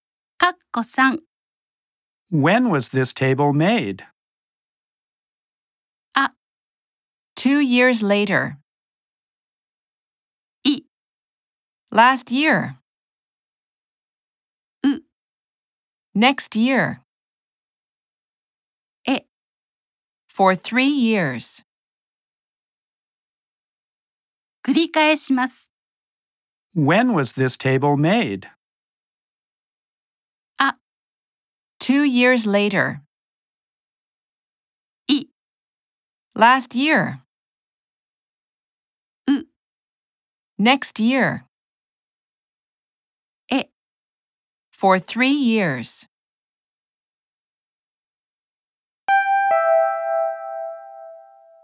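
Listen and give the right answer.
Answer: I: Last year.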